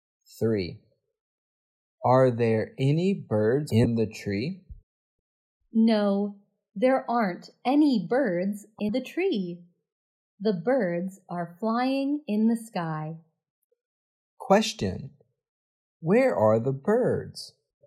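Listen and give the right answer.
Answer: In the sky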